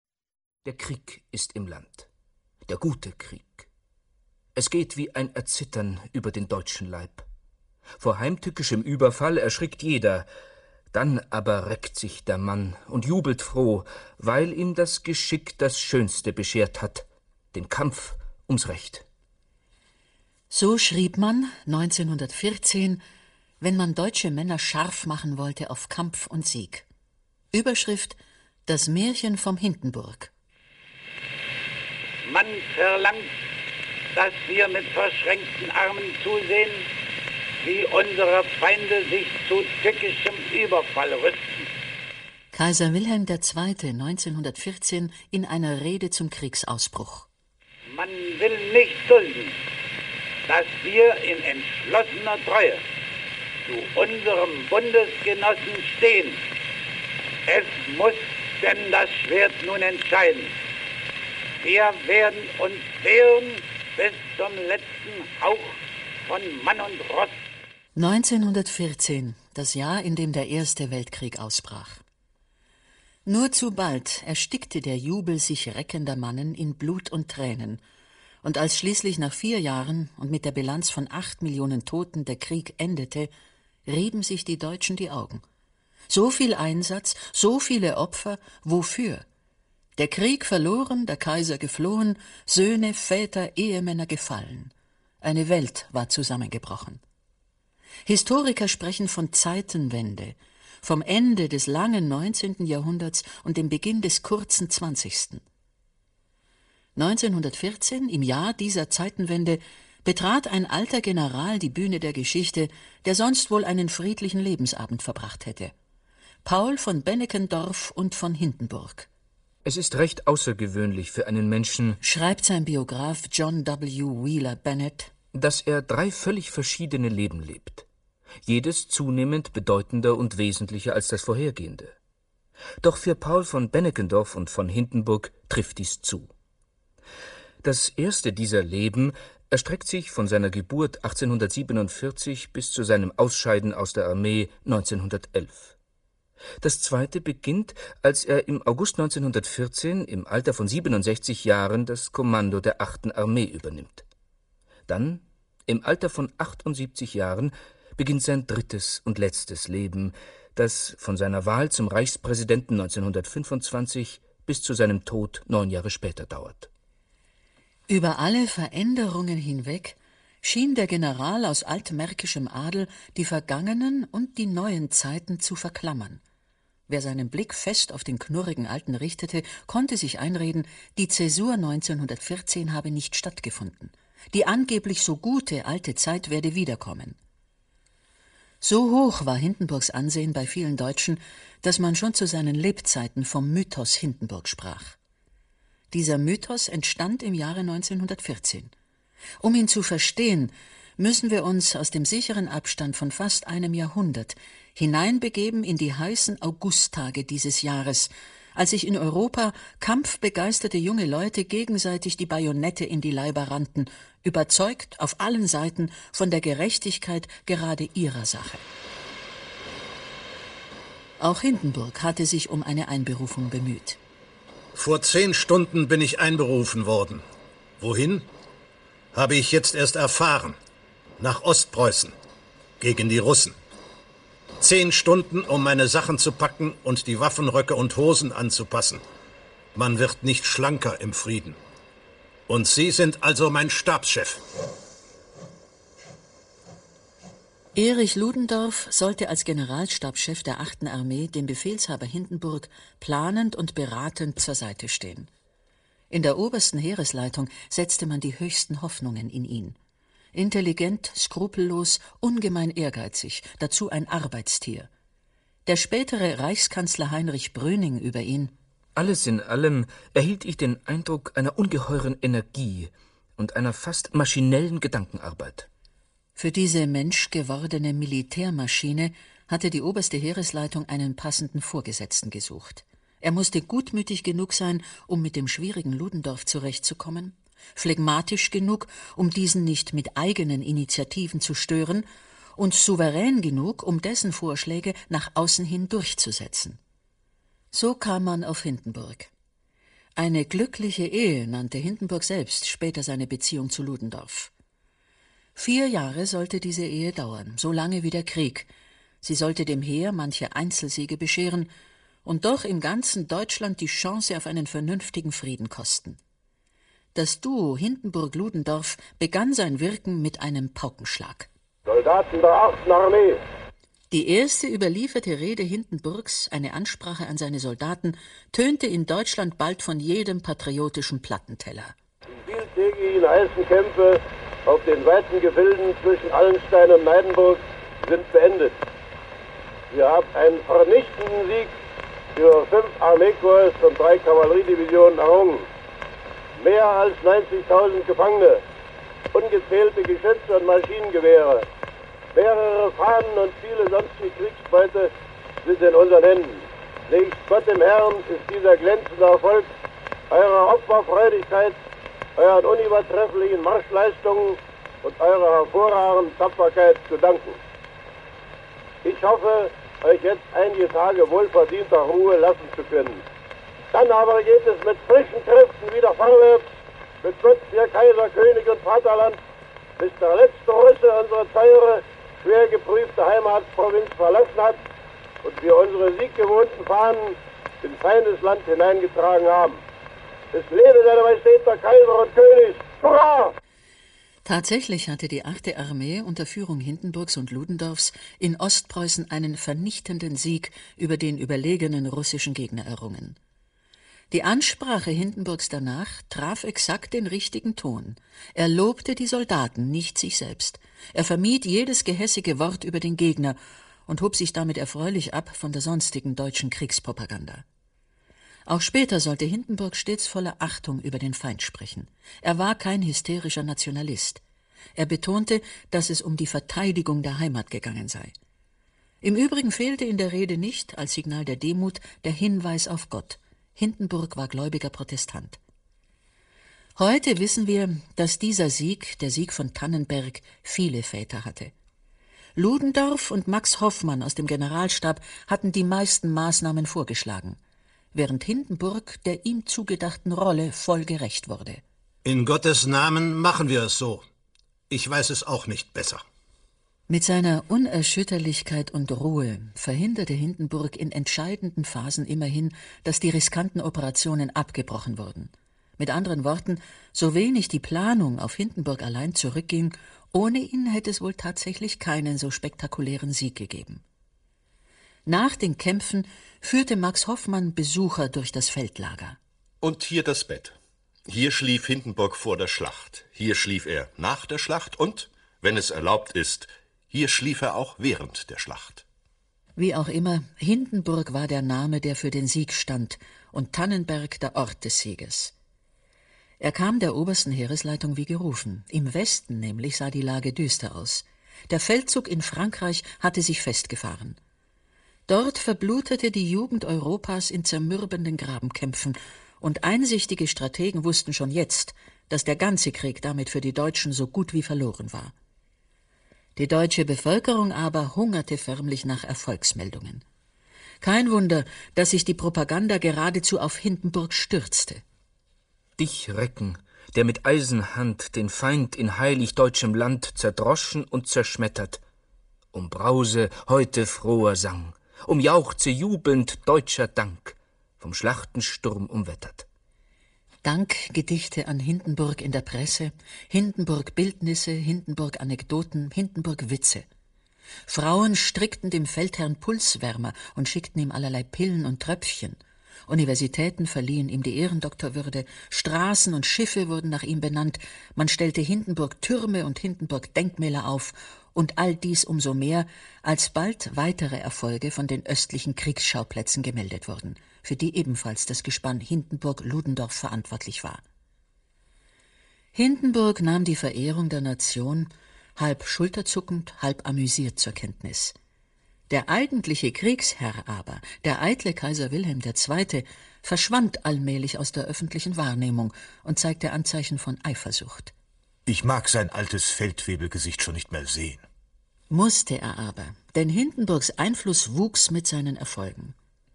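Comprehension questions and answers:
Hören Sie sich das Hörspiel an und füllen Sie den Lückentext aus.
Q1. Historiker sprechen von dem Jahr ______ als von einer ______________: Hier endete das "lange" 19. Jahrhundert (1789 – 1914), hier begann das "kurze" zwanzigste (1914 – 1989).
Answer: 1914; Zeitenwende

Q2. Mit dem Beginn des Krieges in diesem Jahr ______ betrat ein alter General die Bühne der Geschichte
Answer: 1914

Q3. Der Grund für diesen Mythos wurde in einer Reihe von Schlachten gelegt, die in das öffentliche Bewusstsein als "Schlacht von ________________" eingegangen sind.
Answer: Tannenberg

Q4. Zusammen mit seinem Generalstabschef __________________ und dem Generalstäbler Max Hoffmann hatte Hindenburg die Achte Armee in Ostpreußen zu einem Sieg über überlegene ____________ Kräfte geführt.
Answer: Erich Ludendorff; russische

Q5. bedeutete "____________" genau jenes Signal der Hoffnung und Bestätigung, das die deutsche Propaganda jetzt dringend benötigte.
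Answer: Tannenberg

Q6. Im Lauf der nächsten vier Kriegsjahre zogen Hindenburg und ______________ – vor allem auf Betreiben des Letzteren – immer mehr Kompetenzen an sich, sie übernahmen 1916 die ______________________,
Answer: Ludendorff; oberste Heeresleitung

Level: Q2 LK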